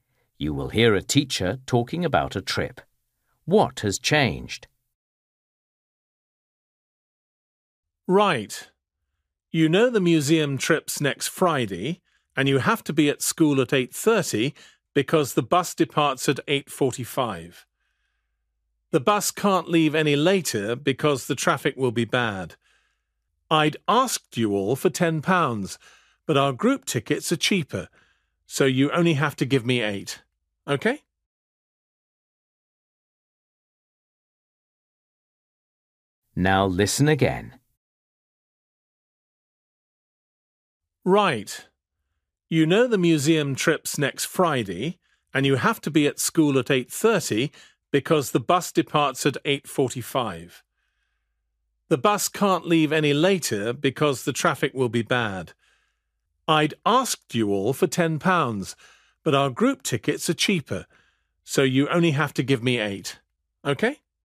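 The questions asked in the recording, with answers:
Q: What has changed?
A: The cost: students only need to pay £8 instead of £10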